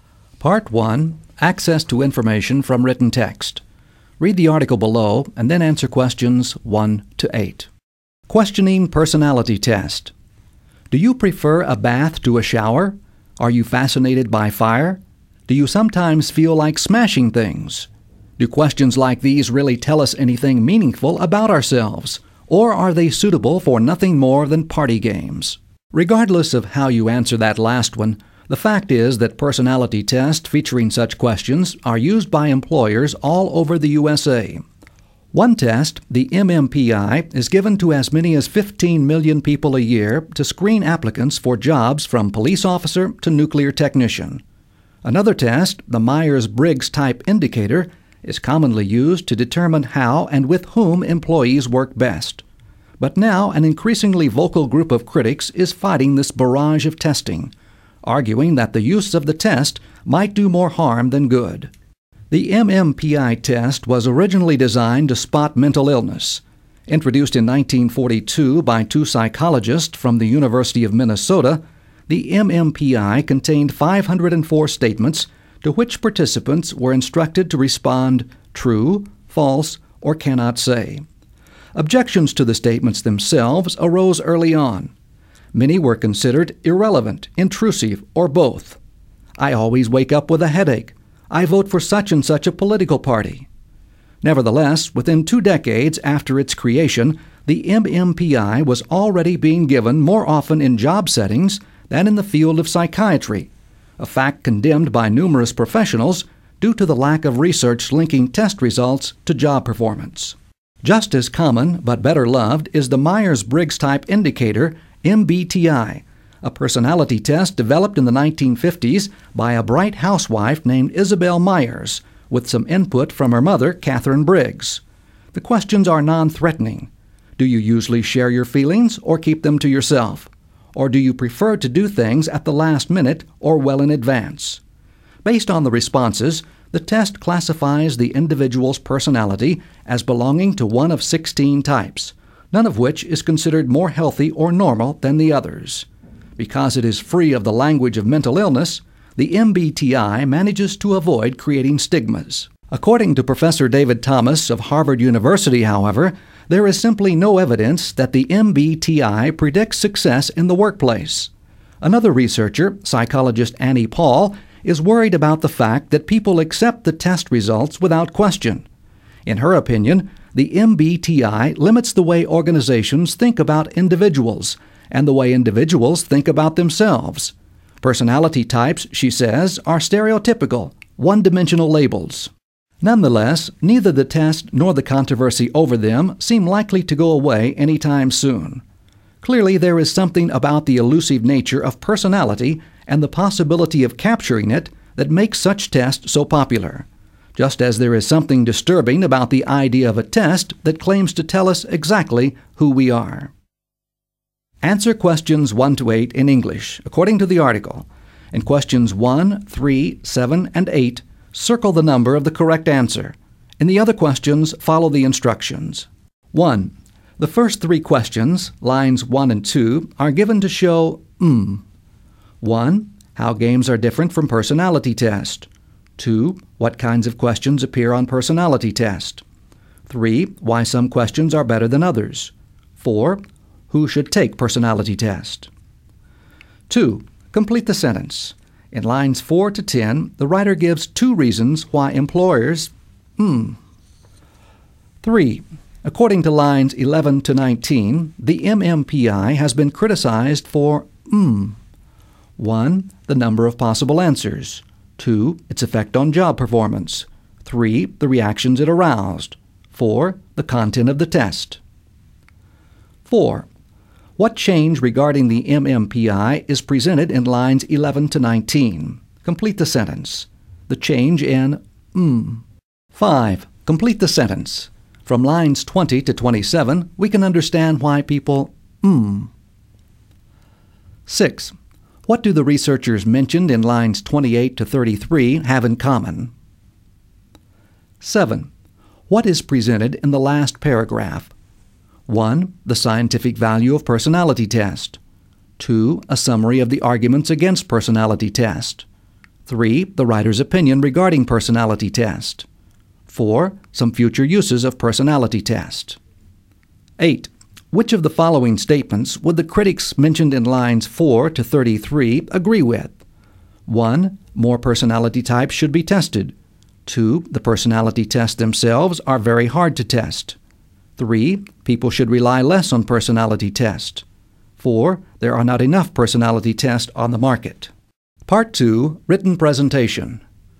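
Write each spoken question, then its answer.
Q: The first three questions, lines 1 and 2, are given to show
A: 2: What kinds of questions appear on personality test.

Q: According to lines 11 to 19, the MMPI has been criticized for...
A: 4: The content of the test.

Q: Which of the following statements would the critics mentioned in lines 4 to 33 agree with?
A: 3: People should rely less on personality tests.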